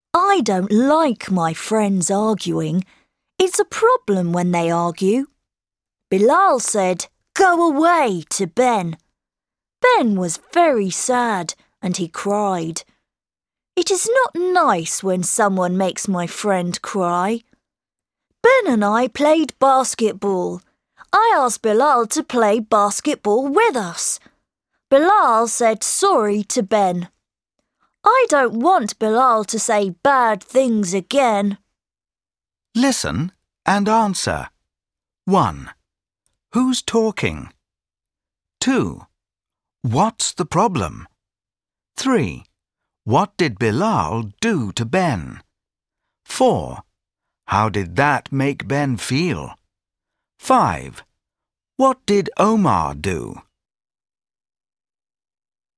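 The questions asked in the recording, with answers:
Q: What's the problem?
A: His friends are arguing.

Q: What did Bilal do to Ben?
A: He said "Go away" to Ben.

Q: How did that make Ben feel?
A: Very sad; he cried.

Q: What did Omar do?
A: He played basketball with Ben and asked Bilal to play with them.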